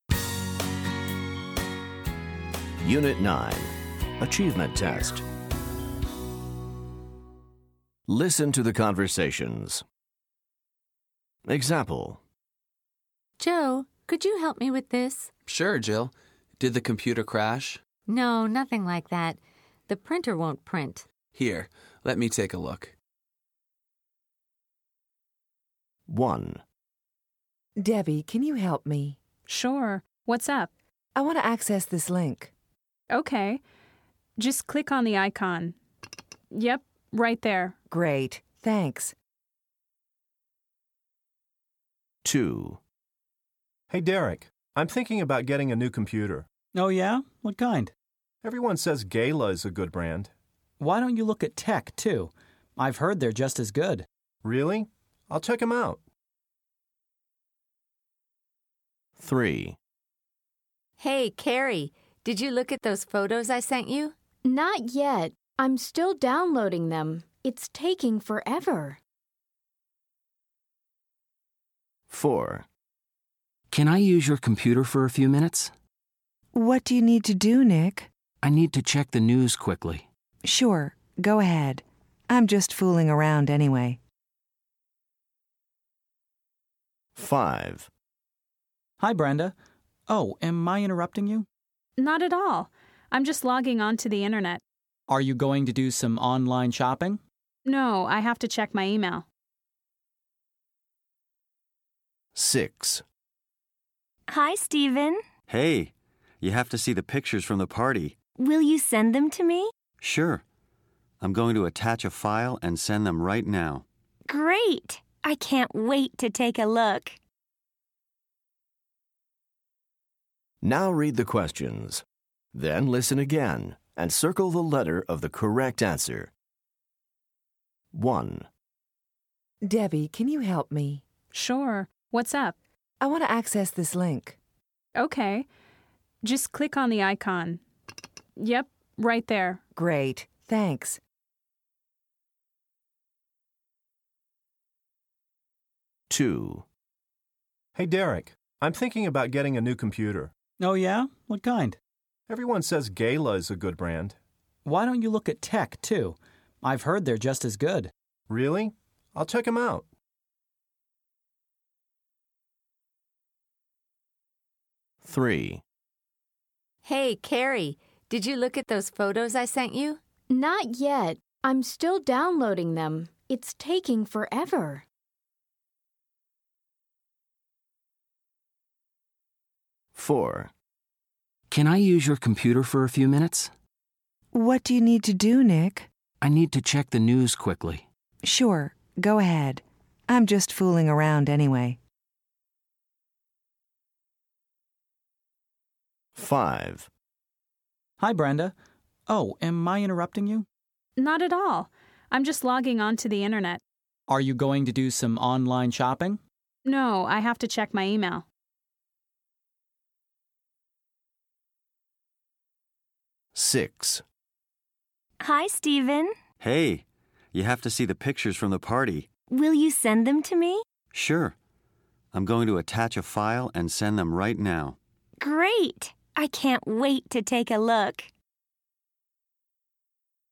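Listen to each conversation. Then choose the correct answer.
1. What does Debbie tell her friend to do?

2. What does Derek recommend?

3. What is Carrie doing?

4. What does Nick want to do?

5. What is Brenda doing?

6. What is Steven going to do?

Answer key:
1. click on the icon
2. look at Tech computers too
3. downloading photos
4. check the news
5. logging onto the internet
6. attach a file and send the pictures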